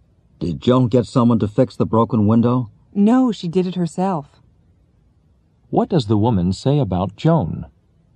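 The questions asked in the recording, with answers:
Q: What does the woman say about Joan?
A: She fixed the broken window herself.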